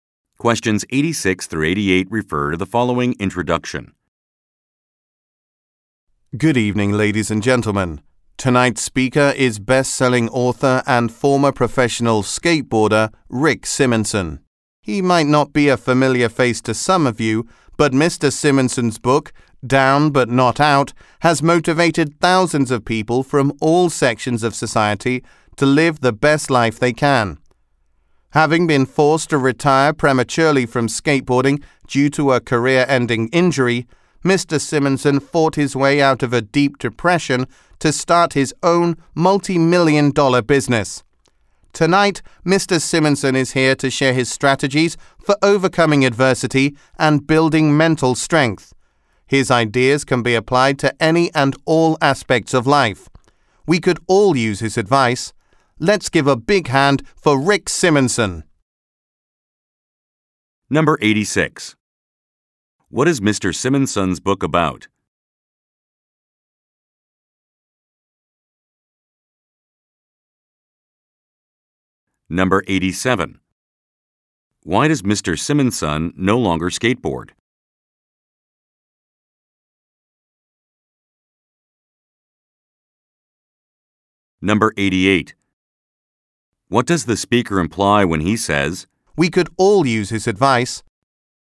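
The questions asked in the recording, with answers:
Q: What is Mr. Simonson's book about?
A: Motivating people to live the best life they can

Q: Why does Mr. Simonson no longer skateboard?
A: He had a career-ending injury

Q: What does the speaker imply when he says, "We could all use his advice"?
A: Mr. Simonson's ideas apply to everyone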